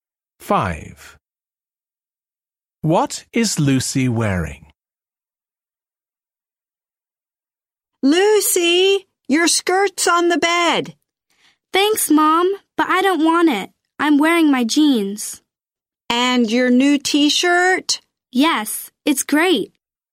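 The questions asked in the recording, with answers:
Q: What is Lucy wearing?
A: Jeans and her new T-shirt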